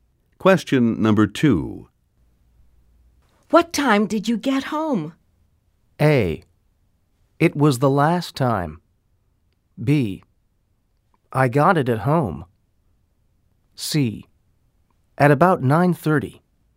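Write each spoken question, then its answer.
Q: What time did you get home?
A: C: At about 9:30.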